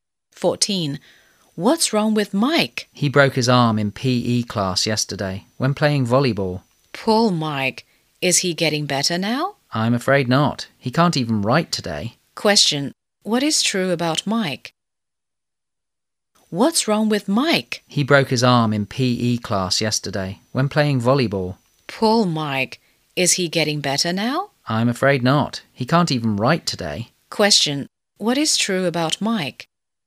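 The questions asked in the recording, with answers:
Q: Question. What is true about Mike?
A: He broke his arm playing volleyball and can't write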